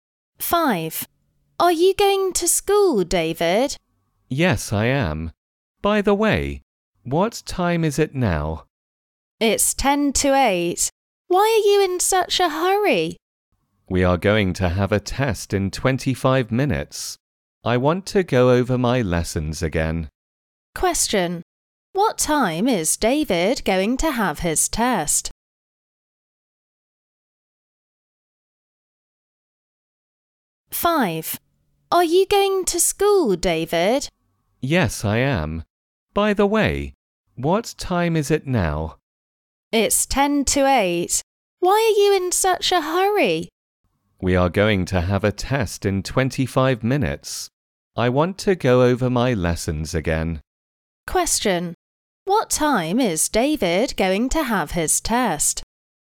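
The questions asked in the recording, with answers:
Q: What time is David going to have his test?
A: At 8:15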